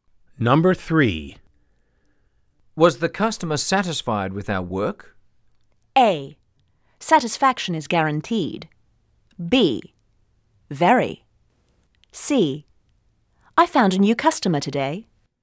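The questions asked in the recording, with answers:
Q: Was the customer satisfied with our work?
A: B: Very.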